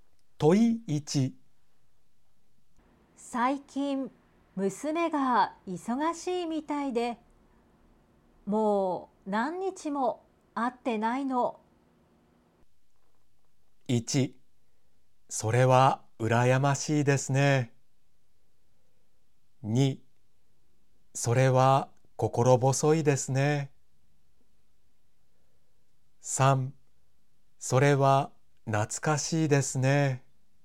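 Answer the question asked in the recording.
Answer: 2: それは心細いですね。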